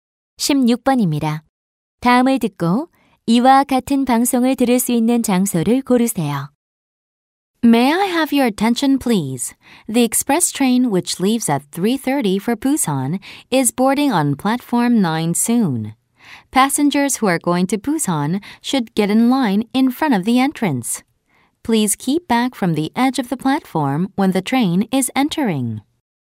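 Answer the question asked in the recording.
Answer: 기차역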